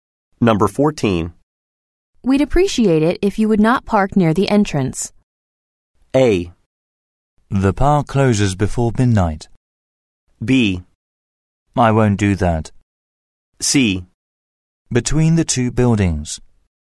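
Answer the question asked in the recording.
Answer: B: I won't do that.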